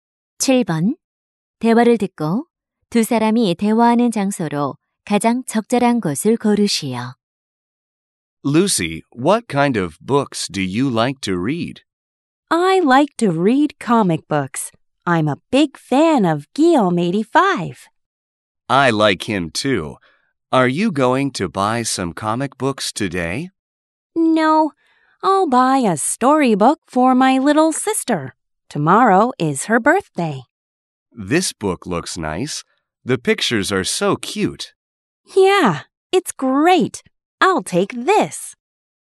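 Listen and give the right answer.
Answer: 서점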